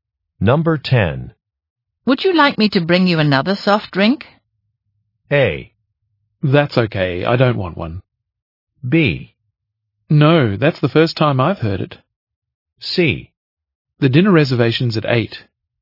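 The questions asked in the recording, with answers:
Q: Would you like me to bring you another soft drink?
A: A: That's okay, I don't want one.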